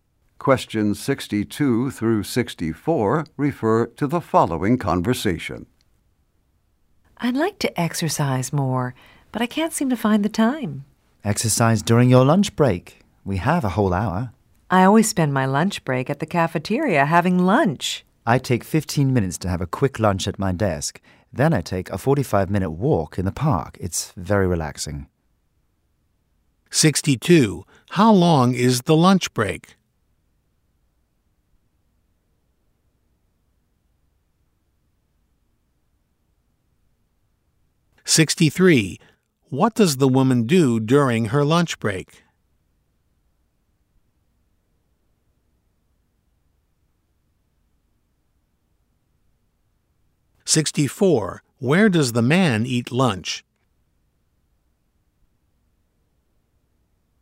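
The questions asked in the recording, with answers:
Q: How long is the lunch break?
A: An hour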